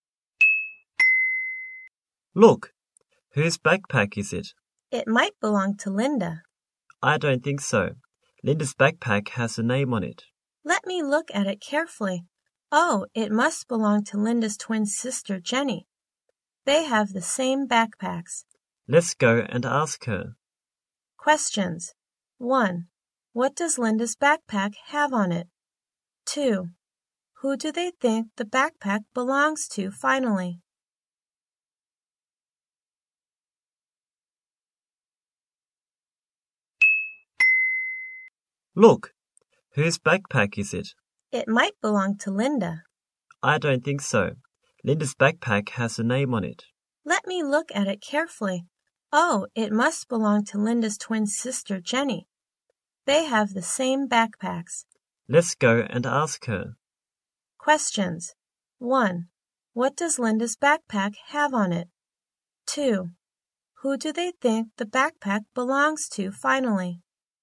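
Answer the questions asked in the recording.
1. A name
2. Jenny, Linda's twin sister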